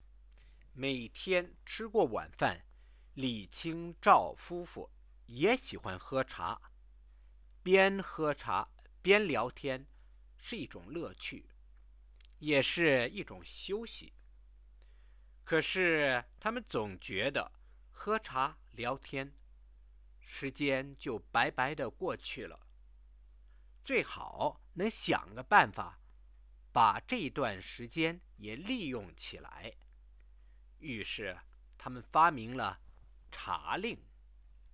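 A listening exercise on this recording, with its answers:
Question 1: Why did Mr and Mrs Li invent the "game of tea drinking "?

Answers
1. They felt time chatting over tea was wasted and wanted to make use of it.

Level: 2nd year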